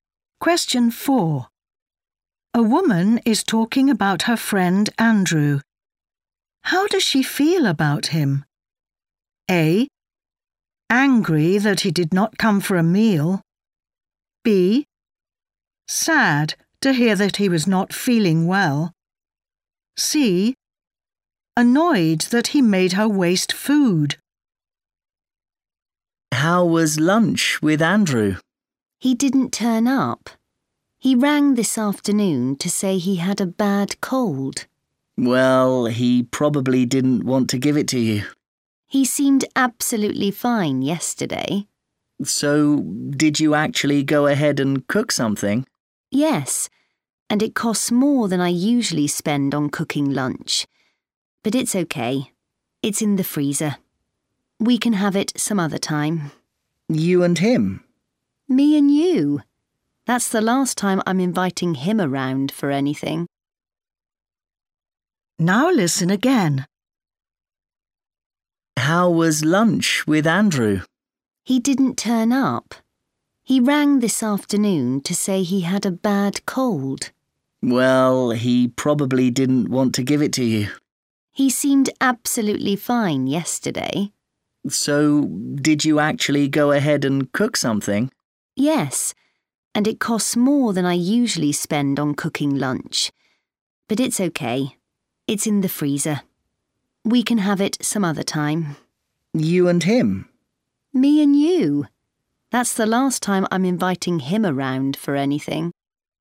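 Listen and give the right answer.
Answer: A: Angry that he did not come for a meal.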